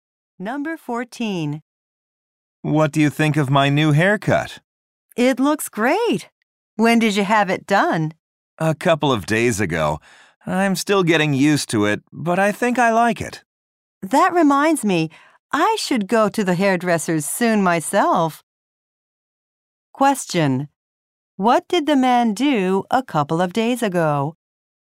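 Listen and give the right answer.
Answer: He got a haircut.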